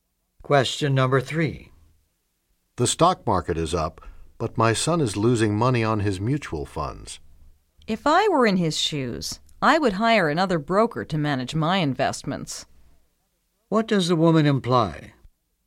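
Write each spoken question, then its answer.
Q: What does the woman imply?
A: Her son should hire a different broker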